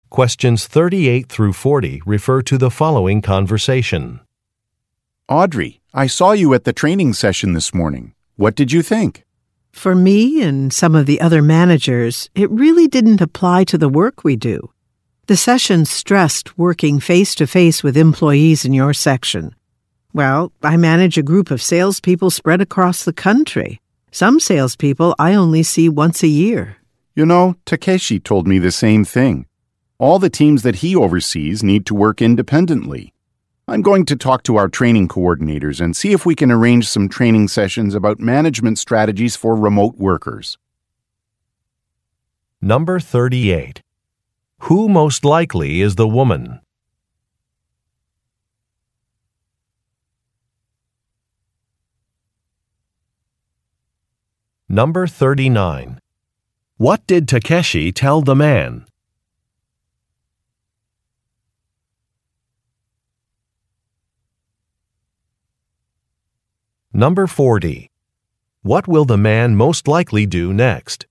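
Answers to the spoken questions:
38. A sales manager
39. The training session didn't apply to his work, since his teams work independently
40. Talk to the training coordinators about training for managing remote workers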